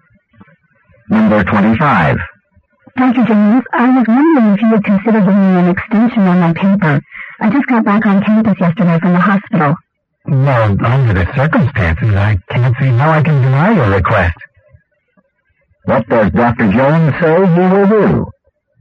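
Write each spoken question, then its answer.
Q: What does Dr. Jones say he will do?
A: Give the student an extension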